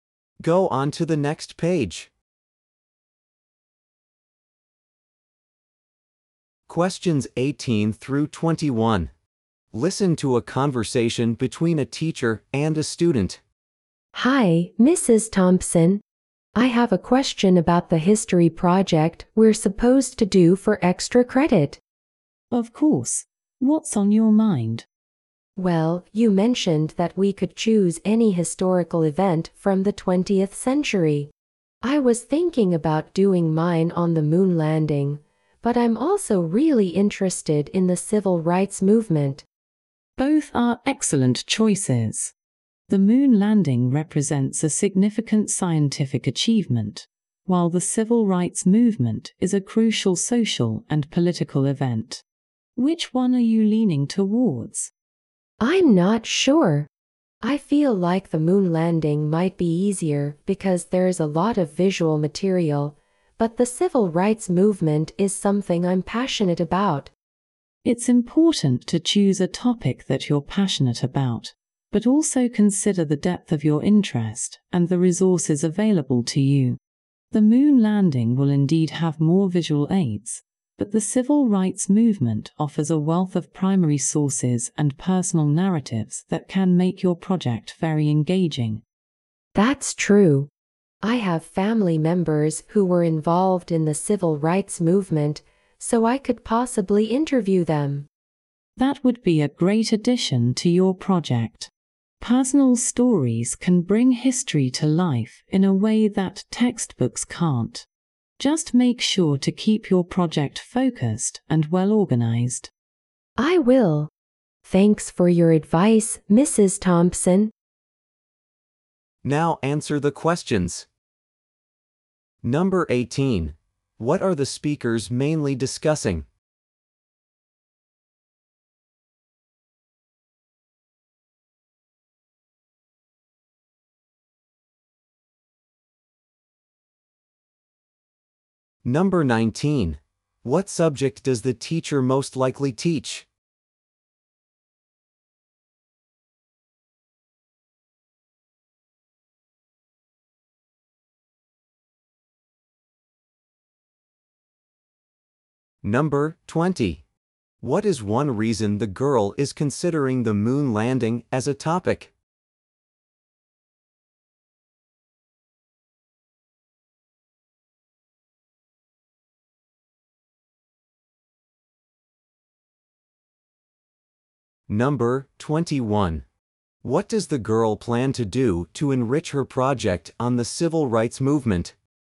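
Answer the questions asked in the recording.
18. Choosing a topic for her history project
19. History
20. There is a lot of visual material
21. Interview family members who were involved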